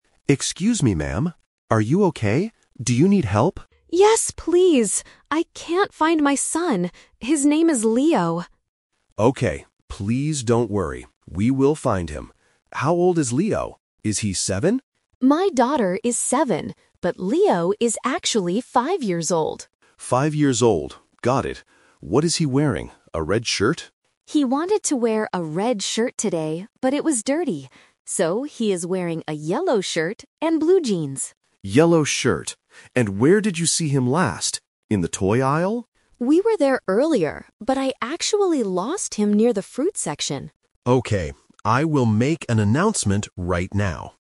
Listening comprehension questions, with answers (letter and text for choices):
Listen to a conversation between a worried mother and a security guard at a supermarket. For each question, choose the correct answer (A, B, or C).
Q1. How old is the lost boy, Leo?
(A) Four years old.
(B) Five years old.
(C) Seven years old.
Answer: (B) Five years old.

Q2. What color shirt is Leo wearing?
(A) Red.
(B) Yellow.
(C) Blue.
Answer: (B) Yellow.

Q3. Where did the mother last see Leo?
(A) In the toy aisle.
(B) Near the fruit section.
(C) At the checkout counter.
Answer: (B) Near the fruit section.

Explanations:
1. The mother corrects the guard about his age: "...but Leo is actually five years old." Why the traps are wrong: Option C is a "Speaker Confusion/Twist" trap. The guard guesses seven, but the mother says that is her daughter's age, not Leo's. Option A is not mentioned.
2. The mother states exactly what he is wearing now: "So, he is wearing a yellow shirt..." Why the traps are wrong: Option A is a "Twist Trap". He wanted to wear a red shirt, but he couldn't because it was dirty. Option C is a trap because "blue" is the color of his jeans, not his shirt.
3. The mother clarifies where he got lost: "...but I actually lost him near the fruit section." Why the traps are wrong: Option A is the "Twist Trap". The guard asks if she lost him in the toy aisle, and she says they were there earlier, but that is not where she lost him. Option C is a plausible supermarket location, but it is not mentioned in the audio.

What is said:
Guard: Excuse me, ma'am. Are you okay? Do you need help?
Mother: Yes, please! I can't find my son. His name is Leo.
Guard: Okay, please don't worry. We will find him. How old is Leo? Is he seven?
Mother: My daughter is seven, but Leo is actually five years old.
Guard: Five years old, got it. What is he wearing? A red shirt?
Mother: He wanted to wear a red shirt today, but it was dirty. So, he is wearing a yellow shirt and blue jeans.
Guard: Yellow shirt. And where did you see him last? In the toy aisle?
Mother: We were there earlier, but I actually lost him near the fruit section.